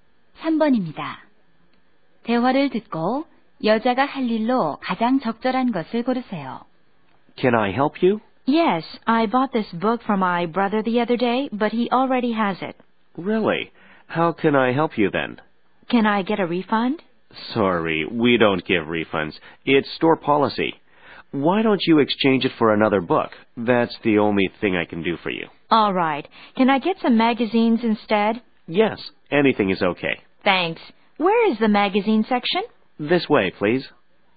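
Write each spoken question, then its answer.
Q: 대화를 듣고 여자가 할 일로 가장 적절한 것을 고르세요.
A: 책을 잡지로 교환하기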